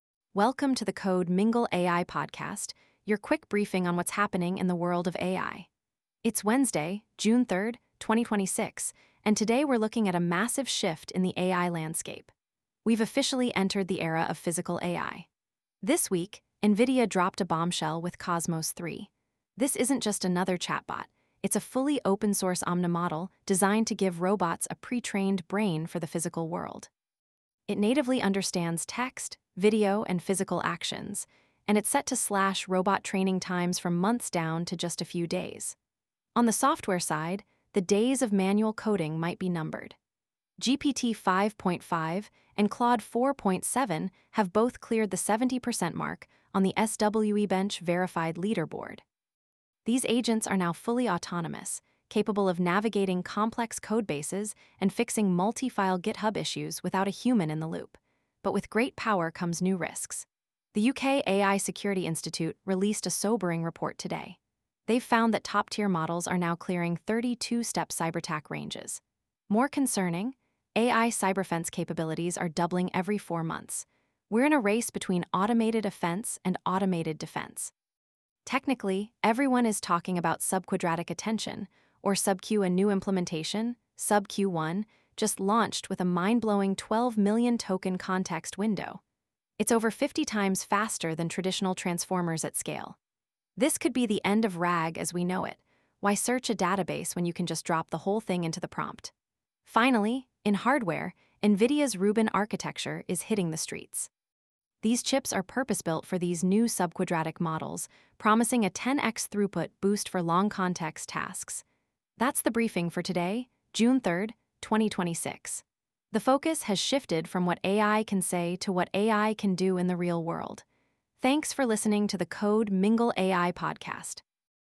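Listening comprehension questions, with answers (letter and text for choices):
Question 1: Which model is the first fully open 'omnimodel' for physical AI released in June 2026?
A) GPT-5.5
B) Cosmos 3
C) SubQ-1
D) Claude 4.7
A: B) Cosmos 3

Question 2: What is the primary architectural breakthrough of the 'SubQ' models?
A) Dense Attention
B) Subquadratic Attention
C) Linear Recurrence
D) Binary Weights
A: B) Subquadratic Attention

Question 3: What is the context window size offered by the new SubQ-1 implementation?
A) 1 Million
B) 128k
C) 12 Million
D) 2 Million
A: C) 12 Million

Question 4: What benchmark threshold did GPT-5.5 and Claude 4.7 cross this week?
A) 50% on SWE-bench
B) 70% on SWE-bench Verified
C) 90% on MMLU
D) 100% on HumanEval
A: B) 70% on SWE-bench Verified

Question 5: According to the UK AI Security Institute, how often are AI cyber-offense capabilities doubling?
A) Every Year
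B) Every 6 Months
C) Every 4 Months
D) Every Month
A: C) Every 4 Months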